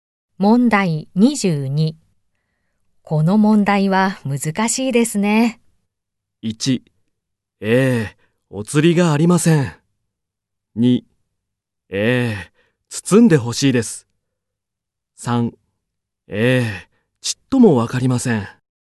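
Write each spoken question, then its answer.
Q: この問題は難しいですね。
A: 3: ええ、ちっともわかりません。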